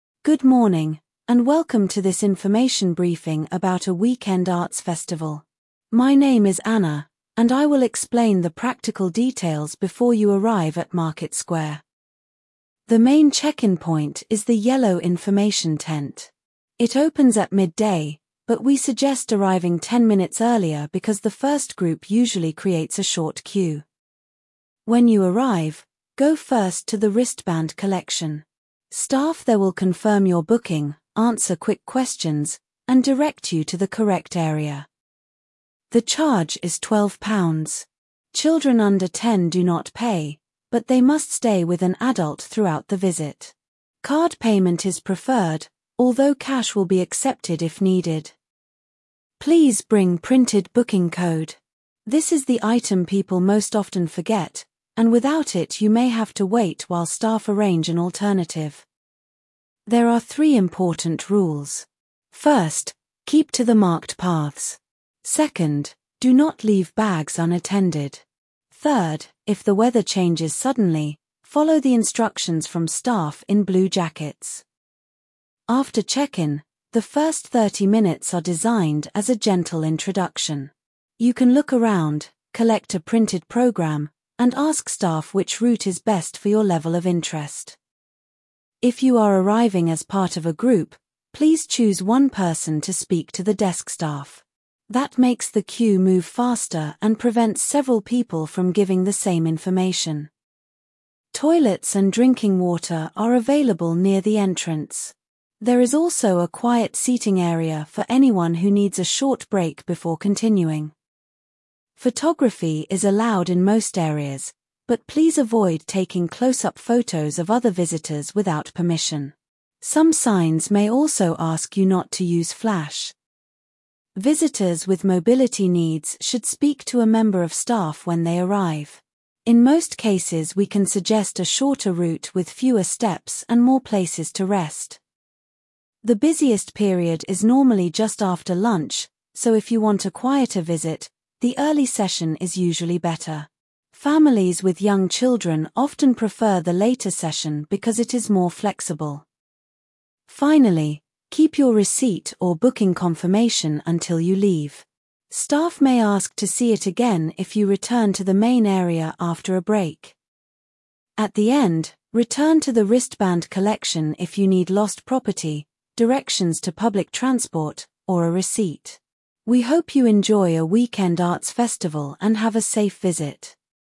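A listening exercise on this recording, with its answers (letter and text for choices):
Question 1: What is the talk mainly about?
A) A weekend arts festival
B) A university lecture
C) A job interview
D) A sports result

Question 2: Where is the main check-in point?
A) Inside the library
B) The yellow information tent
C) Next to platform six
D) At the north car park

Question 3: What time does check-in open?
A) Eight o'clock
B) Midday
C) Three thirty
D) Six fifteen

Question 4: Where should visitors go first?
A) The cafe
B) Wristband collection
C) The medical tent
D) The gift shop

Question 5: How much is the charge?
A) Free for everyone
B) Twelve pounds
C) Twenty pounds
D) Thirty-five pounds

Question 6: What should visitors bring?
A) Printed booking code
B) A laptop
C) A passport photo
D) A bicycle lock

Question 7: Who gives instructions if the weather changes?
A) Staff in blue jackets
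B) The police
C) Bus drivers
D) Ticket sellers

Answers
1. A) A weekend arts festival
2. B) The yellow information tent
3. B) Midday
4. B) Wristband collection
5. B) Twelve pounds
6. A) Printed booking code
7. A) Staff in blue jackets

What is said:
Good morning, and welcome to this information briefing about a weekend arts festival. My name is Anna, and I will explain the practical details before you arrive at Market Square.
The main check-in point is the yellow information tent. It opens at midday, but we suggest arriving ten minutes earlier because the first group usually creates a short queue.
When you arrive, go first to the wristband collection. Staff there will confirm your booking, answer quick questions, and direct you to the correct area.
The charge is twelve pounds. Children under ten do not pay, but they must stay with an adult throughout the visit. Card payment is preferred, although cash will be accepted if needed.
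Please bring printed booking code. This is the item people most often forget, and without it you may have to wait while staff arrange an alternative.
There are three important rules. First, keep to the marked paths. Second, do not leave bags unattended. Third, if the weather changes suddenly, follow the instructions from staff in blue jackets.
After check-in, the first thirty minutes are designed as a gentle introduction. You can look around, collect a printed programme, and ask staff which route is best for your level of interest.
If you are arriving as part of a group, please choose one person to speak to the desk staff. That makes the queue move faster and prevents several people from giving the same information.
Toilets and drinking water are available near the entrance. There is also a quiet seating area for anyone who needs a short break before continuing.
Photography is allowed in most areas, but please avoid taking close-up photos of other visitors without permission. 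Some signs may also ask you not to use flash.
Visitors with mobility needs should speak to a member of staff when they arrive. In most cases we can suggest a shorter route with fewer steps and more places to rest.
The busiest period is normally just after lunch, so if you want a quieter visit, the early session is usually better. Families with young children often prefer the later session because it is more flexible.
Finally, keep your receipt or booking confirmation until you leave. Staff may ask to see it again if you return to the main area after a break.
At the end, return to the wristband collection if you need lost property, directions to public transport, or a receipt. We hope you enjoy a weekend arts festival and have a safe visit.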